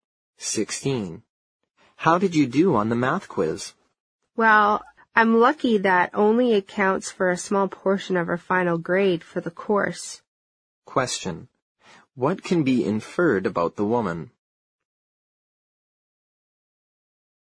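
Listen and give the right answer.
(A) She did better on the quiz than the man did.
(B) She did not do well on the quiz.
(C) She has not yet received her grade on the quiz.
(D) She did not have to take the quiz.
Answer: (B) She did not do well on the quiz.

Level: 六级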